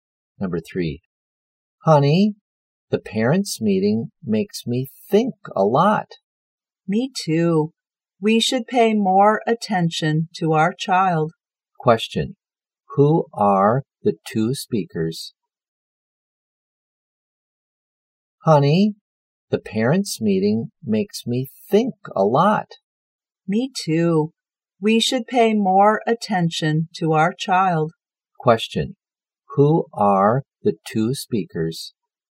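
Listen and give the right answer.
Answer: Parents (husband and wife)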